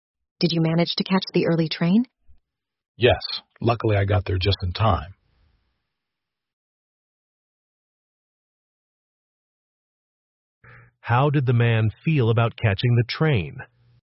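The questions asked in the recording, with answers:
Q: How did the man feel about catching the train?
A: Lucky or relieved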